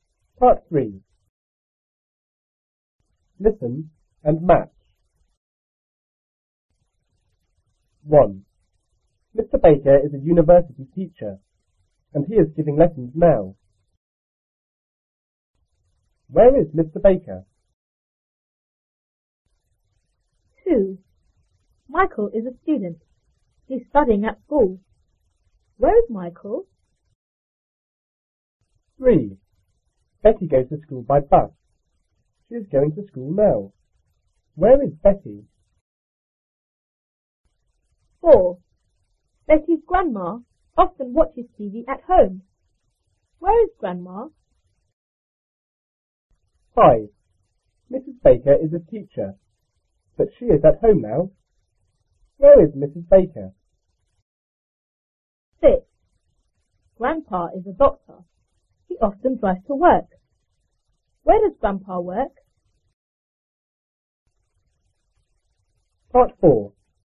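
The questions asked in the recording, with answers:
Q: Where is Mr. Baker?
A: At the university

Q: Where is Michael?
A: At school

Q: Where is Betty?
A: On the bus

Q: Where is grandma?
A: At home

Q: Where is Mrs. Baker?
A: At home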